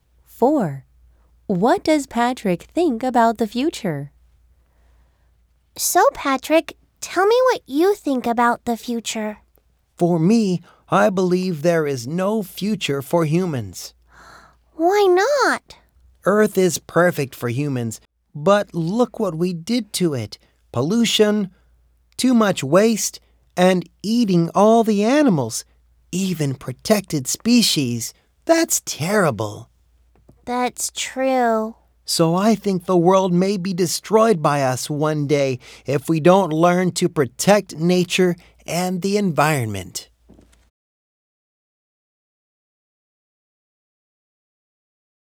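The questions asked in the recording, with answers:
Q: What does Patrick think about the future?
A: Humans may destroy the world if they don't protect nature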